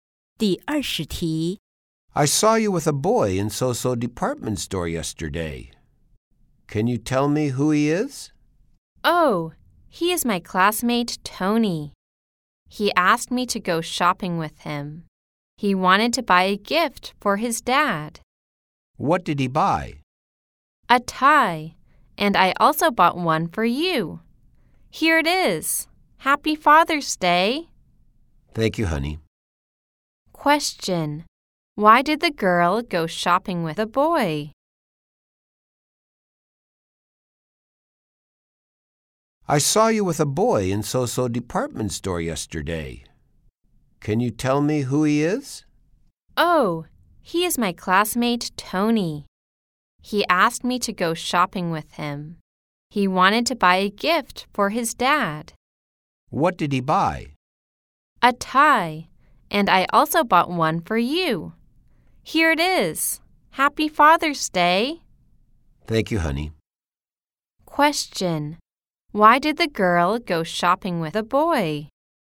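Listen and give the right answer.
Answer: Tony asked her to help him buy a gift for his dad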